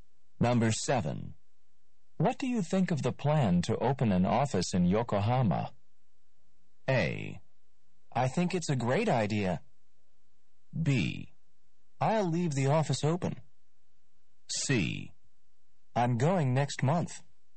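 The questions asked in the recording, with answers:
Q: What do you think of the plan to open an office in Yokohama?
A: A: I think it's a great idea.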